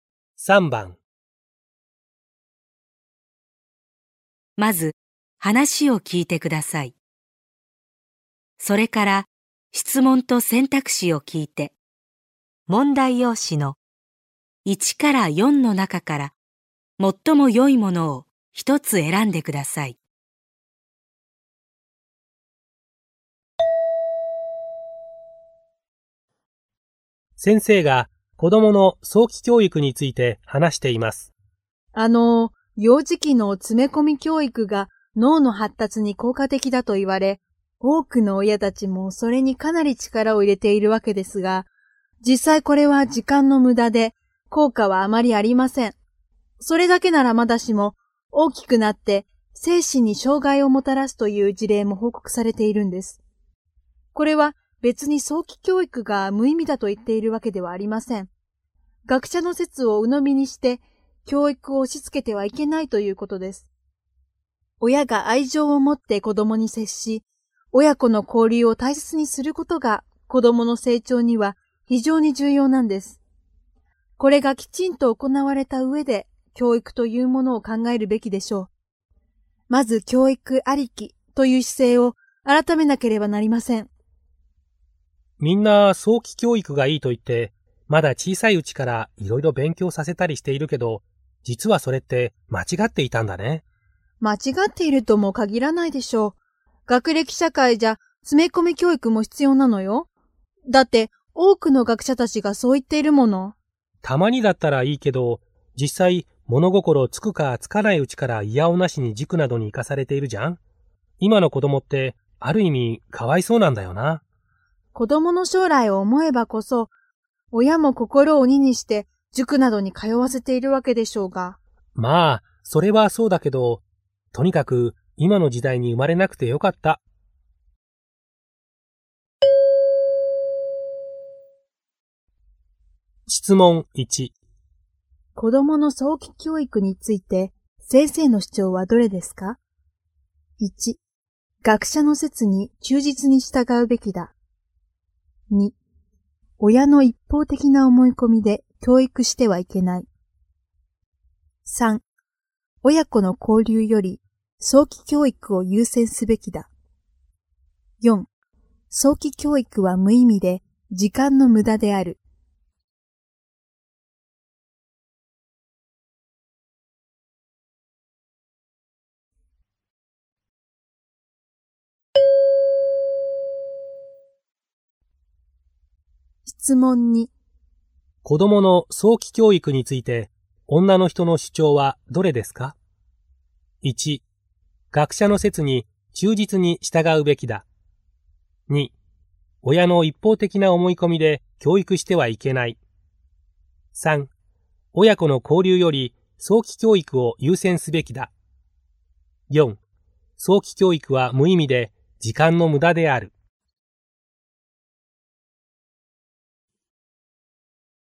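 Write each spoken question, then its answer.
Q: 子供の早期教育について、先生の主張はどれですか ?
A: 2: 親の一方的な思い込みで教育してはいけない。

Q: 子供の早期教育について女の人の主張はどれですか ?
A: 1: 学者の説に忠実に従うべきだ。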